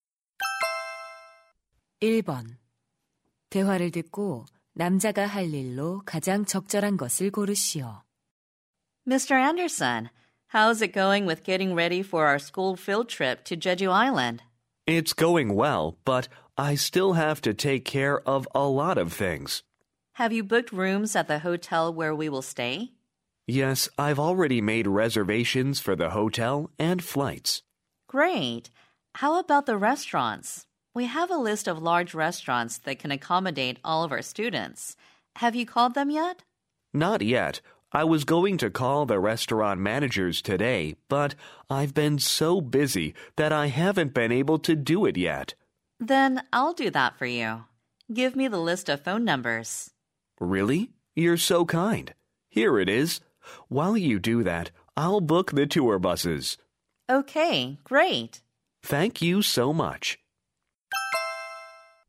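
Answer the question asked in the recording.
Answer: 관광버스 예약하기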